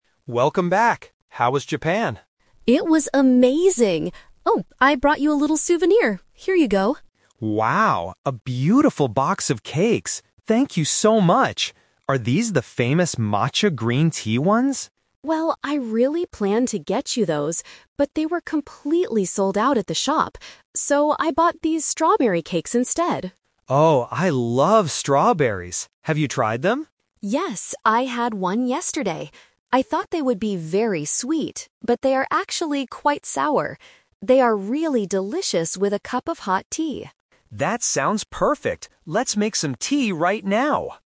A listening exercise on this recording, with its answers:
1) What kind of cakes did the woman give to the man?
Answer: Strawberry cakes.

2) Why didn't she buy the green tea cakes?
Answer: There were none left in the shop.

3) How does the woman describe the taste of the cakes she bought?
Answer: They are a little sour.

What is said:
Man: Welcome back! How was Japan?
Woman: It was amazing! Oh, I brought you a little souvenir. Here you go.
Man: Wow, a beautiful box of cakes! Thank you so much. Are these the famous matcha green tea ones?
Woman: Well, I really planned to get you those, but they were completely sold out at the shop. So, I bought these strawberry cakes instead.
Man: Oh, I love strawberries! Have you tried them?
Woman: Yes, I had one yesterday. I thought they would be very sweet, but they are actually quite sour. They are really delicious with a cup of hot tea.